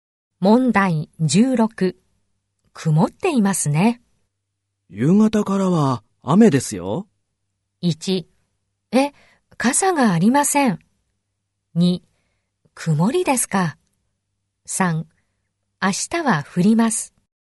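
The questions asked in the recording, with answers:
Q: 曇っていますね。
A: 1: え、傘がありません。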